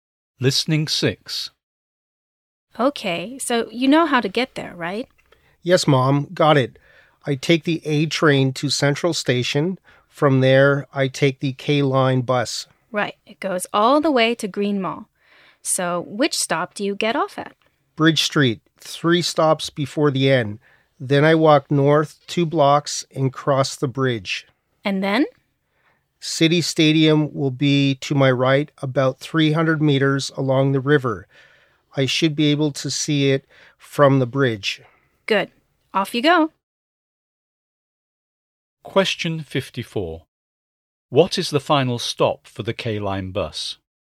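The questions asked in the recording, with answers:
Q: What is the final stop for the K-Line bus?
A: Green Mall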